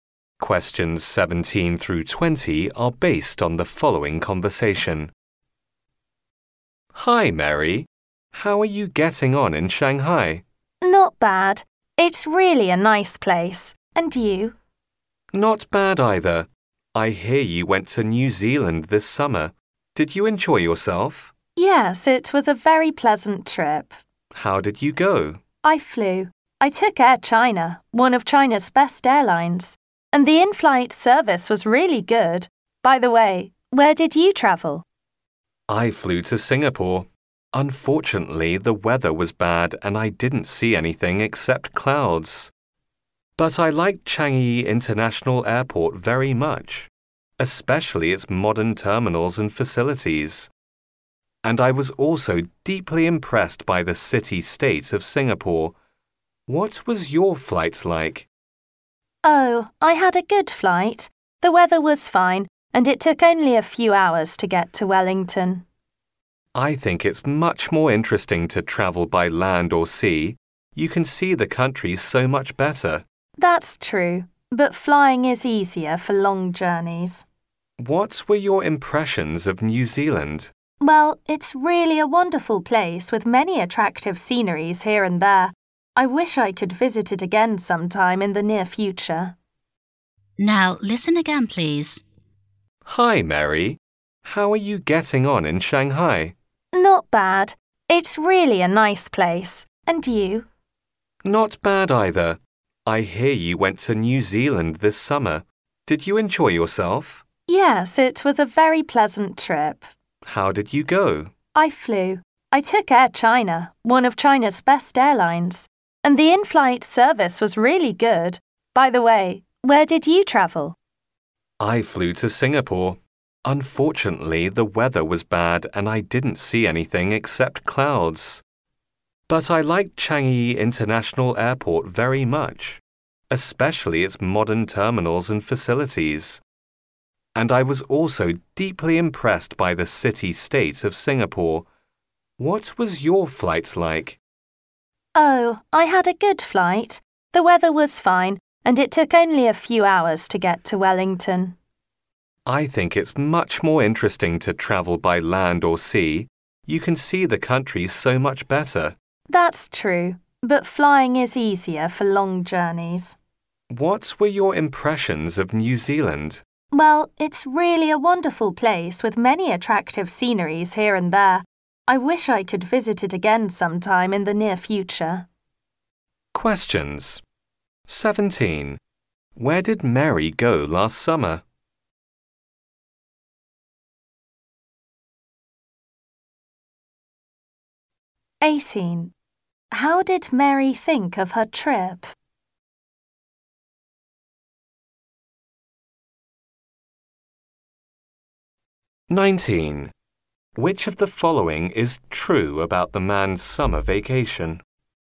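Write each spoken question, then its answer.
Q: Where did Mary go last summer?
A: New Zealand

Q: How did Mary think of her trip?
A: It was very pleasant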